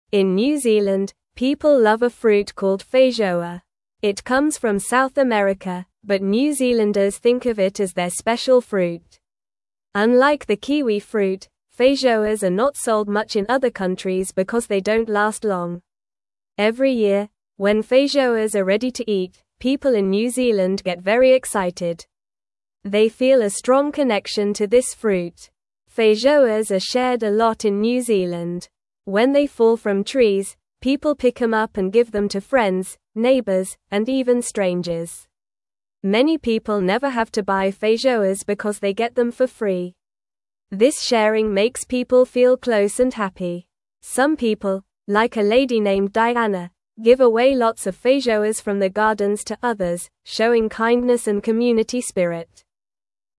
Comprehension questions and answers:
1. Where does the feijoa come from?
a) Australia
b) Africa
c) Asia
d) South America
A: South America

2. How do New Zealanders feel about feijoas?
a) Sad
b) Excited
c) Angry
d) Tired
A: Excited

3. What do people do with feijoas when they fall from trees?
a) Throw them away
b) Pick them up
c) Eat them all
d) Plant them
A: Pick them up

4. Who do people share feijoas with?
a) Only family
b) Only kids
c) Friends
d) Only pets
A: Friends

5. Why do many people not buy feijoas?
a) They are too expensive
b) They do not like them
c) They are not good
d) They get them for free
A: They get them for free

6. What does sharing feijoas make people feel?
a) Tired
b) Lonely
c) Happy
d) Bored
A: Happy

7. Who is a lady that gives away feijoas?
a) Diana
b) Sarah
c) Emily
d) Jessica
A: Diana

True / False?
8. People in New Zealand get very happy when feijoas are ready to eat.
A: True

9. Some people ignore fallen feijoas from trees.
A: False

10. Feijoas come from South America.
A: True

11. Feijoas do not last long when picked.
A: True

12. A lady named Diana gives away feijoas from her garden.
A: True

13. Sharing feijoas makes people feel distant and unhappy.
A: False

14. Few people in New Zealand share feijoas with others.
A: False

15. In New (1)______, people love a fruit called (2)______.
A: Zealand

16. In New (1)______, people love a fruit called (2)______.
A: feijoa

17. Every year, when feijoas are (3)______ to eat, people in New Zealand get very (4)______.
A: ready

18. Every year, when feijoas are (3)______ to eat, people in New Zealand get very (4)______.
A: excited

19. When they fall from trees, people pick them up and give them to (5)______, neighbors, and even strangers.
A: friends

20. Many people never (6)______ to buy feijoas because they get them for free.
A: have

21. This sharing makes people feel close and (7)______.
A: happy

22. Some people, like a lady named Diana, give away lots of feijoas from their gardens to others, showing (8)______ and community spirit.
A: kindness

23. Where does the feijoa fruit come from?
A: The feijoa fruit comes from South America.

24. Why are feijoas not sold much in other countries?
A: Feijoas are not sold much in other countries because they don't last long.

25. How do people in New Zealand feel when feijoas are ready to eat?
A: People in New Zealand feel very excited when feijoas are ready to eat.

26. What do people do when feijoas fall from trees?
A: When feijoas fall from trees, people pick them up and share them.

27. Who is a lady that gives away feijoas from her garden?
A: A lady named Diana gives away feijoas from her garden.

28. How does sharing feijoas make people feel?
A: Sharing feijoas makes people feel close and happy.

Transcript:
In New Zealand, people love a fruit called feijoa. It comes from South America, but New Zealanders think of it as their special fruit. Unlike the kiwi fruit, feijoas are not sold much in other countries because they don't last long. Every year, when feijoas are ready to eat, people in New Zealand get very excited. They feel a strong connection to this fruit.
Feijoas are shared a lot in New Zealand. When they fall from trees, people pick them up and give them to friends, neighbors, and even strangers. Many people never have to buy feijoas because they get them for free. This sharing makes people feel close and happy. Some people, like a lady named Diana, give away lots of feijoas from their gardens to others, showing kindness and community spirit.

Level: Level 1

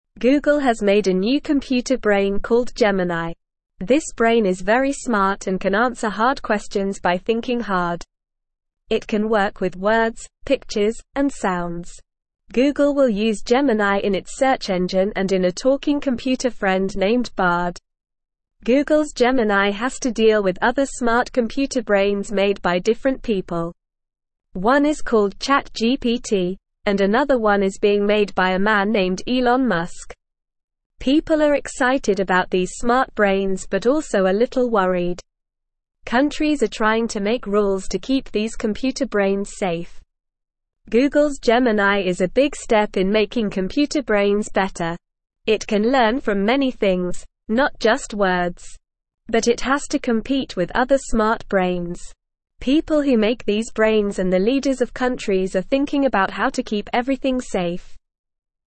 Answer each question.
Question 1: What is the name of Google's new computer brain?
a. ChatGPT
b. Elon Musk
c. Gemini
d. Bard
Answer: Gemini

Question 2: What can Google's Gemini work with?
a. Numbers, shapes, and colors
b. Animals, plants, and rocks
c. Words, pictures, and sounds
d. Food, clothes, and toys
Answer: Words, pictures, and sounds

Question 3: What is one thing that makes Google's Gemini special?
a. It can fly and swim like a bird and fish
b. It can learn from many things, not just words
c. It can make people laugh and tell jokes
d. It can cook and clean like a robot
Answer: It can learn from many things, not just words

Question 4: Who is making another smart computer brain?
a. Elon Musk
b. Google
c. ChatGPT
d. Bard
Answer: Elon Musk

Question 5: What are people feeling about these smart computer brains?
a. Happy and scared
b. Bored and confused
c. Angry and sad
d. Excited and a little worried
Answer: Excited and a little worried

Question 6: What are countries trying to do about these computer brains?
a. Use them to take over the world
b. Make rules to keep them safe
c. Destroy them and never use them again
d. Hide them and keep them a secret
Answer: Make rules to keep them safe

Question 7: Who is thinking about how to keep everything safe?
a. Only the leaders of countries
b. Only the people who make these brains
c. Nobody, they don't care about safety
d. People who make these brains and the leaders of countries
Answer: People who make these brains and the leaders of countries

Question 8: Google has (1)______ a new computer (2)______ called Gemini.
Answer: made

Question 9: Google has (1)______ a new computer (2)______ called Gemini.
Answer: brain

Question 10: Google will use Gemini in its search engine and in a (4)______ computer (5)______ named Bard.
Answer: talking

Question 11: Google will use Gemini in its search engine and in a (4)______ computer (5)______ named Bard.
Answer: friend

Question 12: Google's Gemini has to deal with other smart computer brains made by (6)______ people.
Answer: different

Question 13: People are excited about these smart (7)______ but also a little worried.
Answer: brains

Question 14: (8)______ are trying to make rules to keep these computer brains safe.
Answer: Countries

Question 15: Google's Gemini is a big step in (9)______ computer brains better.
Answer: making

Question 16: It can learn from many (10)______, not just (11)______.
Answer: things

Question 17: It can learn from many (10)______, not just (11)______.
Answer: words

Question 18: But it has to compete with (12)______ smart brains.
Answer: other

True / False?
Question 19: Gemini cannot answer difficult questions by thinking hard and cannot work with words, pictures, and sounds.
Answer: False

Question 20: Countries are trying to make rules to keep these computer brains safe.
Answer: True

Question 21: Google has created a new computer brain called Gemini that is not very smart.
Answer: False

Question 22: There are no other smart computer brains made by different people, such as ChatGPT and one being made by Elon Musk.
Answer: False

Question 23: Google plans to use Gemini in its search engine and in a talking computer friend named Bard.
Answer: True

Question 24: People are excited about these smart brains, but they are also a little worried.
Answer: True

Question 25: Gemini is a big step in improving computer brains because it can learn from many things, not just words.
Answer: True

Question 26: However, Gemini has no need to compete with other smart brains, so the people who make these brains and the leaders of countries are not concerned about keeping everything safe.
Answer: False

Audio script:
Google has made a new computer brain called Gemini. This brain is very smart and can answer hard questions by thinking hard. It can work with words, pictures, and sounds. Google will use Gemini in its search engine and in a talking computer friend named Bard.
Google's Gemini has to deal with other smart computer brains made by different people. One is called ChatGPT, and another one is being made by a man named Elon Musk. People are excited about these smart brains but also a little worried.
Google's Gemini is a big step in making computer brains better. But it has to compete with other smart brains. People who make these brains and the leaders of countries are thinking about how to keep everything safe.

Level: Level 2

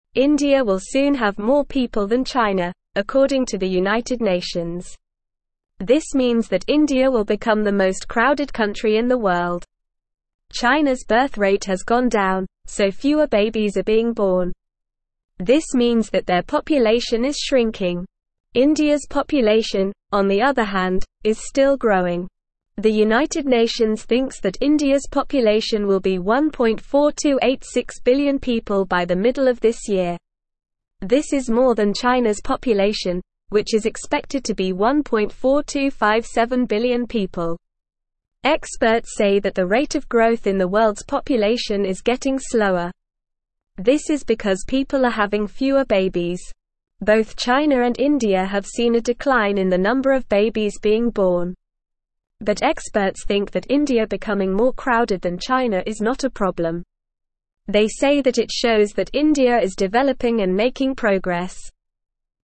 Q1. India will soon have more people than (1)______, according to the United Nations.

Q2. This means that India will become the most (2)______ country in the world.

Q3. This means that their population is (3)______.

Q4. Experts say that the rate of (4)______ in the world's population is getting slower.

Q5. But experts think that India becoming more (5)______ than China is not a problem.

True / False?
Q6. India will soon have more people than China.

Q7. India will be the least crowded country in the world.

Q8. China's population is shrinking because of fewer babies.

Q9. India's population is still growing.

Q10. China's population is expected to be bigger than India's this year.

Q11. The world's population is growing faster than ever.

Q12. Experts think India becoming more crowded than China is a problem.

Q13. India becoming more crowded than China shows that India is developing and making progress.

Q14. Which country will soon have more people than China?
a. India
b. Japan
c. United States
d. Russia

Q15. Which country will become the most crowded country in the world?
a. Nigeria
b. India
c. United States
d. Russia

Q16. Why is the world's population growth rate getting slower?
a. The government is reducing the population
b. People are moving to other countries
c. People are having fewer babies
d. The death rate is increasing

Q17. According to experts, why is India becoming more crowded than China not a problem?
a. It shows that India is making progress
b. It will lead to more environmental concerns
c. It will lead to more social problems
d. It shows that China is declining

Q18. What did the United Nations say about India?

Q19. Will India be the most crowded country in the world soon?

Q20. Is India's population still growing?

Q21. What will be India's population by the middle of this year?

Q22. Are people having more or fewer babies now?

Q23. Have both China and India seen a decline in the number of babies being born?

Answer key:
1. China
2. crowded
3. shrinking
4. growth
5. crowded
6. True
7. False
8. True
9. True
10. False
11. False
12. False
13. True
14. India
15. India
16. People are having fewer babies
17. It shows that India is making progress
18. The United Nations said that India will soon have more people than China.
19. Yes, India will be the most crowded country in the world soon.
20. Yes, India's population is still growing.
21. India's population will be 1.4286 billion people by the middle of this year.
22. People are having fewer babies now.
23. Yes, both China and India have seen a decline in the number of babies being born.

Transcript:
India will soon have more people than China, according to the United Nations. This means that India will become the most crowded country in the world. China's birth rate has gone down, so fewer babies are being born. This means that their population is shrinking. India's population, on the other hand, is still growing. The United Nations thinks that India's population will be 1.4286 billion people by the middle of this year. This is more than China's population, which is expected to be 1.4257 billion people.
Experts say that the rate of growth in the world's population is getting slower. This is because people are having fewer babies. Both China and India have seen a decline in the number of babies being born. But experts think that India becoming more crowded than China is not a problem. They say that it shows that India is developing and making progress.

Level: Level 1

